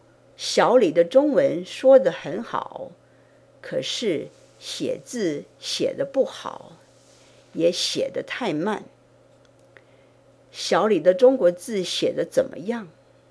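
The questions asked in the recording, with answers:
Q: 小李的中国字写得怎么样?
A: 写得不好,也写得太慢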